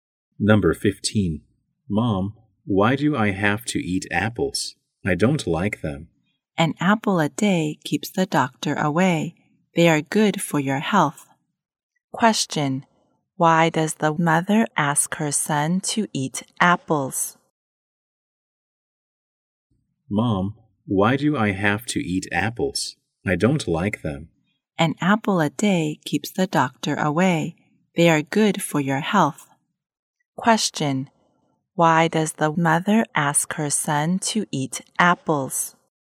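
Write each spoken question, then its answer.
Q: Question: Why does the mother ask her son to eat apples?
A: Because apples are good for his health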